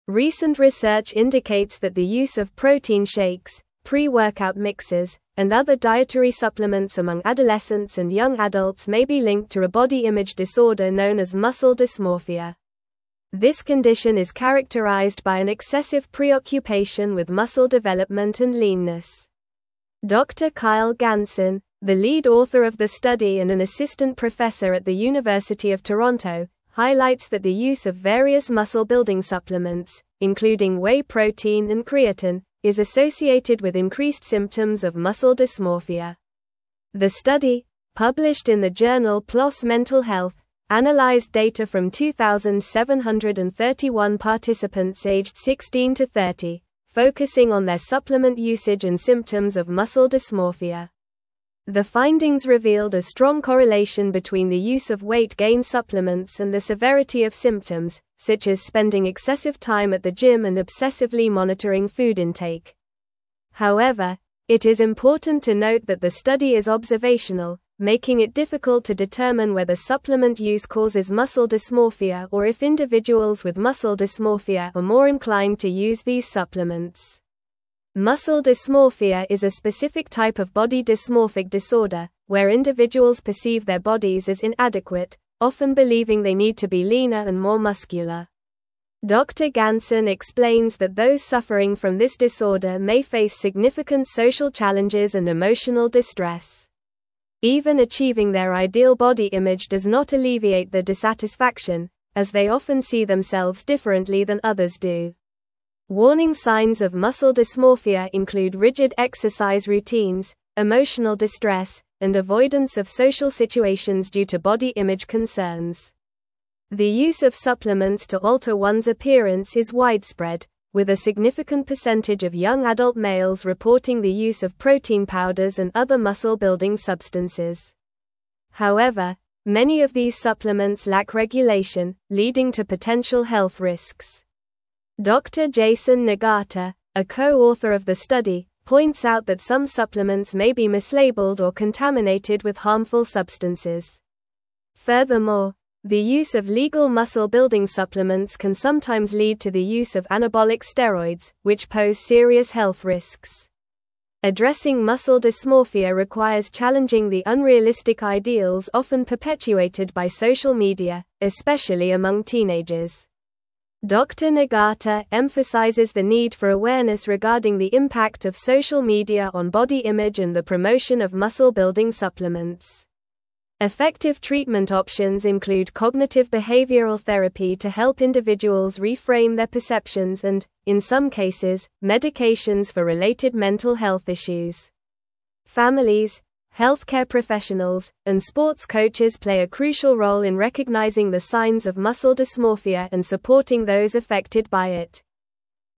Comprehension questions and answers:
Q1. Recent research indicates that the use of protein shakes, pre-workout mixes, and other dietary supplements among (1)______ and young adults may be linked to a body image disorder known as muscle dysmorphia.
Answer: adolescents

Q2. Dr. Kyle Ganson, the lead author of the (2)______ and an assistant professor at the University of Toronto,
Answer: study

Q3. the use of various muscle-building supplements, (3)______ whey protein and (4)______, is associated with increased symptoms of muscle dysmorphia.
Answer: including

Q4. the use of various muscle-building supplements, (3)______ whey protein and (4)______, is associated with increased symptoms of muscle dysmorphia.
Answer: creatine

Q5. However, it is important to note that the study is (5)______, making it (6)______ to (7)______ whether supplement use causes muscle dysmorphia or if (8)______ with muscle dysmorphia are more inclined to use these supplements.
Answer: observational

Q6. However, it is important to note that the study is (5)______, making it (6)______ to (7)______ whether supplement use causes muscle dysmorphia or if (8)______ with muscle dysmorphia are more inclined to use these supplements.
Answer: difficult

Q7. However, it is important to note that the study is (5)______, making it (6)______ to (7)______ whether supplement use causes muscle dysmorphia or if (8)______ with muscle dysmorphia are more inclined to use these supplements.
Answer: determine

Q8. However, it is important to note that the study is (5)______, making it (6)______ to (7)______ whether supplement use causes muscle dysmorphia or if (8)______ with muscle dysmorphia are more inclined to use these supplements.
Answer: individuals

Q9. Warning signs of muscle dysmorphia include rigid (9)______ routines, emotional distress, and avoidance of social (10)______ due to body image concerns.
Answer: exercise

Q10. Warning signs of muscle dysmorphia include rigid (9)______ routines, emotional distress, and avoidance of social (10)______ due to body image concerns.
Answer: situations

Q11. The use of supplements to alter one's appearance is widespread, with a (11)______ percentage of young adult males reporting the use of protein powders and other muscle-building (12)______.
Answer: significant

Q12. The use of supplements to alter one's appearance is widespread, with a (11)______ percentage of young adult males reporting the use of protein powders and other muscle-building (12)______.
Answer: substances

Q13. Furthermore, the use of legal (13)______-building supplements can sometimes lead to the use of anabolic steroids, which pose serious health risks.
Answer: muscle

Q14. Addressing muscle dysmorphia (14)______ challenging the unrealistic ideals often perpetuated by social media, especially among teenagers.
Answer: requires

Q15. Dr. Nagata emphasizes the need for awareness regarding the (15)______ of social media on body image and the promotion of muscle-building supplements.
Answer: impact

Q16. Effective treatment (16)______ include cognitive behavioral therapy to help individuals reframe their perceptions and, in some cases, medications for related mental health issues.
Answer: options

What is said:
Recent research indicates that the use of protein shakes, pre-workout mixes, and other dietary supplements among adolescents and young adults may be linked to a body image disorder known as muscle dysmorphia. This condition is characterized by an excessive preoccupation with muscle development and leanness. Dr. Kyle Ganson, the lead author of the study and an assistant professor at the University of Toronto, highlights that the use of various muscle-building supplements, including whey protein and creatine, is associated with increased symptoms of muscle dysmorphia.
The study, published in the journal PLOS Mental Health, analyzed data from 2,731 participants aged 16 to 30, focusing on their supplement usage and symptoms of muscle dysmorphia. The findings revealed a strong correlation between the use of weight-gain supplements and the severity of symptoms, such as spending excessive time at the gym and obsessively monitoring food intake. However, it is important to note that the study is observational, making it difficult to determine whether supplement use causes muscle dysmorphia or if individuals with muscle dysmorphia are more inclined to use these supplements.
Muscle dysmorphia is a specific type of body dysmorphic disorder, where individuals perceive their bodies as inadequate, often believing they need to be leaner and more muscular. Dr. Ganson explains that those suffering from this disorder may face significant social challenges and emotional distress. Even achieving their ideal body image does not alleviate their dissatisfaction, as they often see themselves differently than others do. Warning signs of muscle dysmorphia include rigid exercise routines, emotional distress, and avoidance of social situations due to body image concerns.
The use of supplements to alter one's appearance is widespread, with a significant percentage of young adult males reporting the use of protein powders and other muscle-building substances. However, many of these supplements lack regulation, leading to potential health risks. Dr. Jason Nagata, a co-author of the study, points out that some supplements may be mislabeled or contaminated with harmful substances. Furthermore, the use of legal muscle-building supplements can sometimes lead to the use of anabolic steroids, which pose serious health risks.
Addressing muscle dysmorphia requires challenging the unrealistic ideals often perpetuated by social media, especially among teenagers. Dr. Nagata emphasizes the need for awareness regarding the impact of social media on body image and the promotion of muscle-building supplements. Effective treatment options include cognitive behavioral therapy to help individuals reframe their perceptions and, in some cases, medications for related mental health issues. Families, healthcare professionals, and sports coaches play a crucial role in recognizing the signs of muscle dysmorphia and supporting those affected by it.

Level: Level 4